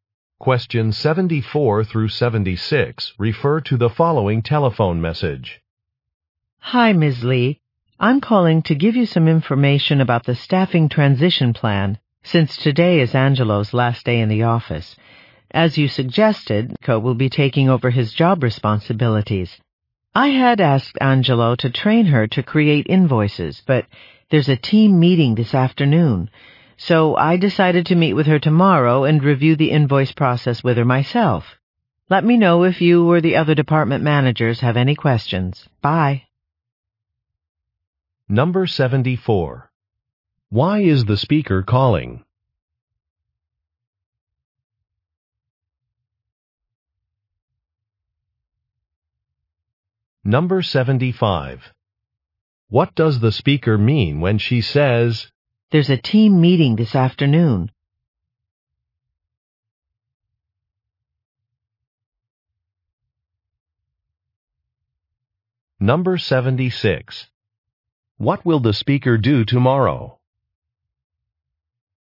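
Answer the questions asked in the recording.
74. To give information about the staffing transition plan
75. Angelo does not have time to train Co today
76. Review the invoice process with Co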